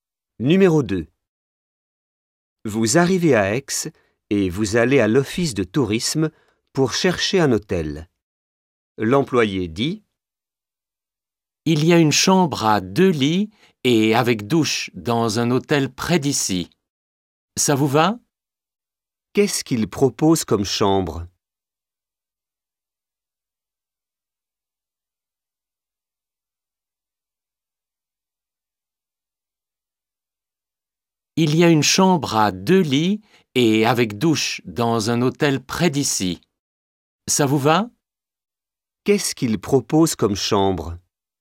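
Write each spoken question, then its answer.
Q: Qu'est-ce qu'il propose comme chambre?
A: Une chambre à deux lits avec douche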